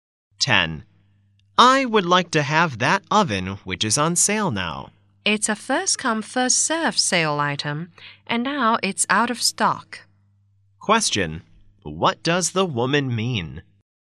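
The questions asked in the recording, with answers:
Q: What does the woman mean?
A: The oven has sold out, so he can't buy it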